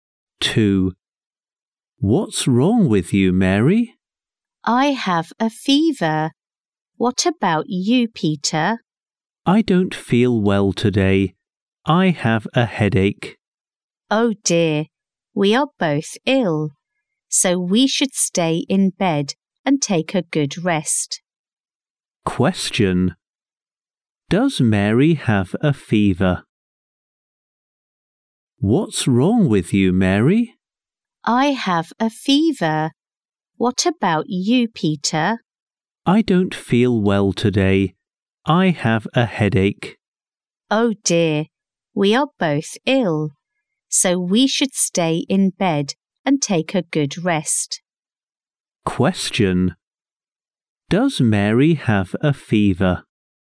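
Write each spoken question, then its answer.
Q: Does Mary have a fever?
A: Yes, she does.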